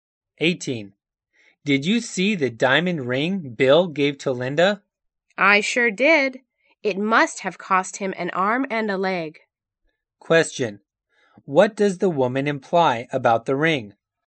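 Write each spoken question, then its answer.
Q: What does the woman imply about the ring?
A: It was very expensive.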